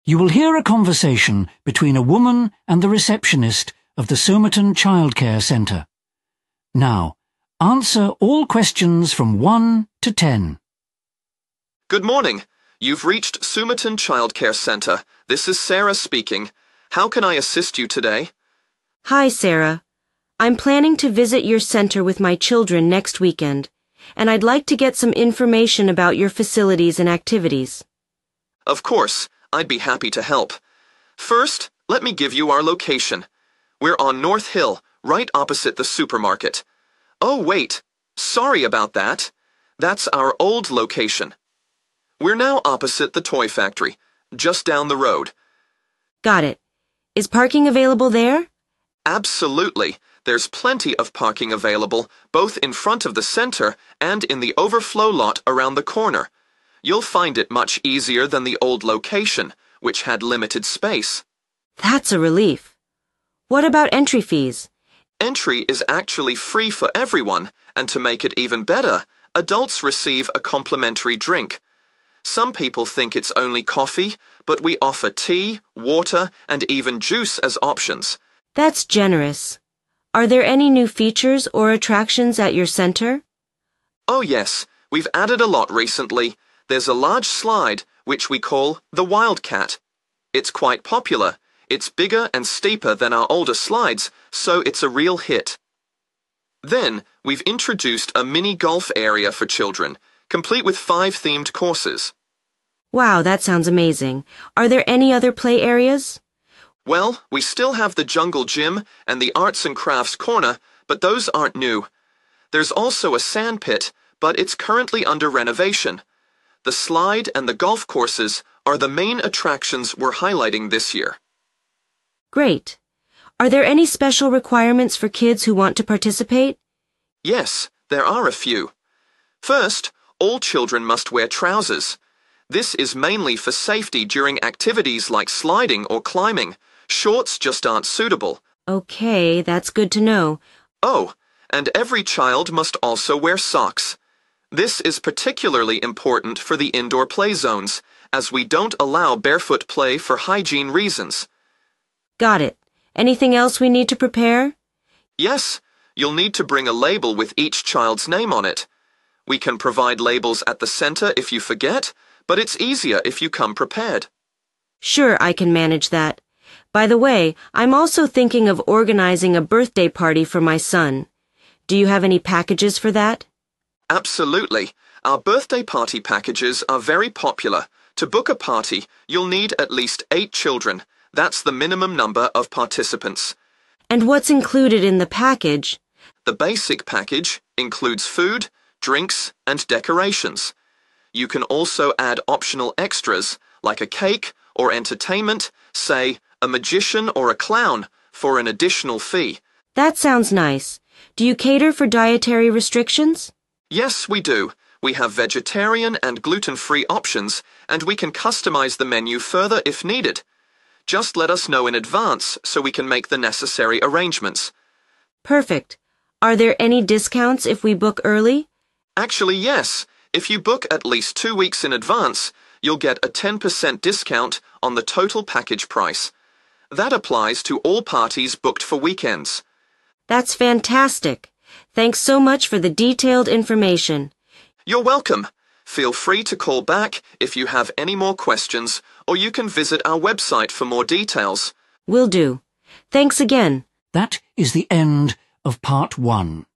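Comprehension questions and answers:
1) Location: North Hill, opposite the (1)____________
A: toy factory

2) A lot of areas for: 2_______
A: parking

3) Free entry includes a free: 3. ___________to adults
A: drink

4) New attractions include a large: 4.___________ for the 'wildcat'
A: slide

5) Children can play in new: 5.___________ courses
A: mini golf

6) Children must wear: 6. ___________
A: trousers

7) Wear a pair of: 7. ___________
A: socks

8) Give a label for their: 8. ___________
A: name

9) Minimum number of participants: 9. ___________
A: 8

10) Birthday parties include: food, drink, 10. ___________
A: decorations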